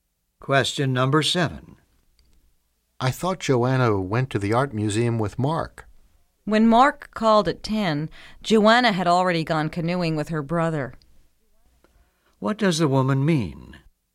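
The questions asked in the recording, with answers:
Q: What does the woman mean?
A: Joanna went canoeing with her brother, not to the museum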